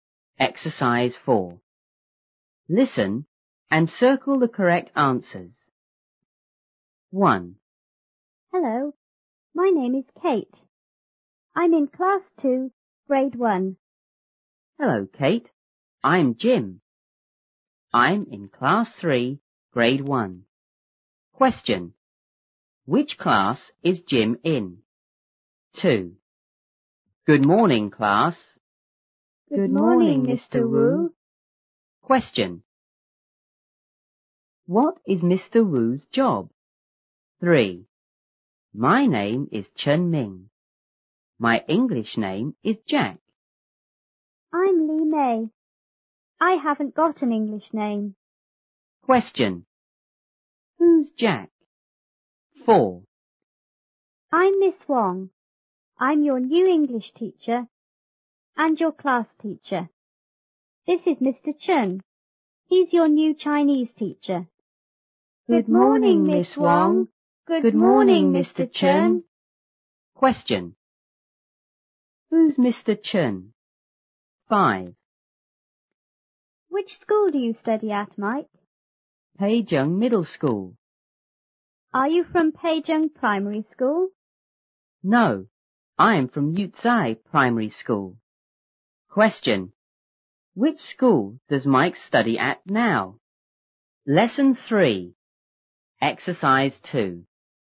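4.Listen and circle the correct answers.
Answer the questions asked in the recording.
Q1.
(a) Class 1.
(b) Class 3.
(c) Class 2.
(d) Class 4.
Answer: (b) Class 3.
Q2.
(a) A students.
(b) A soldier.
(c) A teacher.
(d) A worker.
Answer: (c) A teacher.
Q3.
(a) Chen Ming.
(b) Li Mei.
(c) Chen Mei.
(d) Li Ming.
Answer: (a) Chen Ming.
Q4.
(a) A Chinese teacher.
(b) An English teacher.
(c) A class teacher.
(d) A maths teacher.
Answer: (a) A Chinese teacher.
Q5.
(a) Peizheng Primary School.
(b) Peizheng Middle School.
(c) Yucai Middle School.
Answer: (b) Peizheng Middle School.

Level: 初中英语广州版1B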